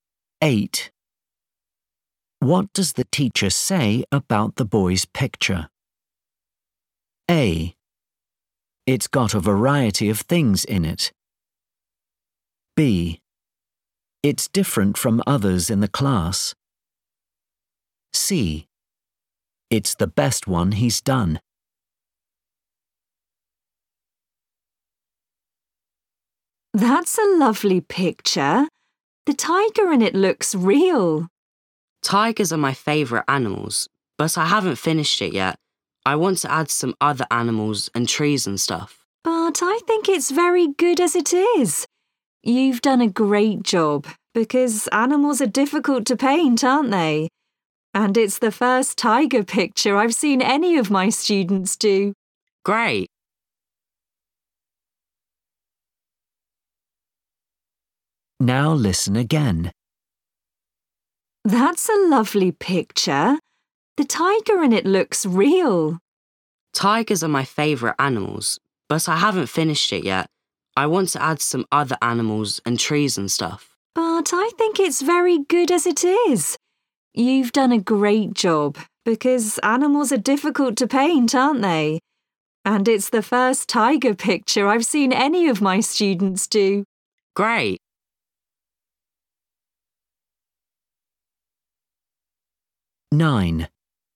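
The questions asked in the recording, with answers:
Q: What does the teacher say about the boy's picture?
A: B: It's different from others in the class.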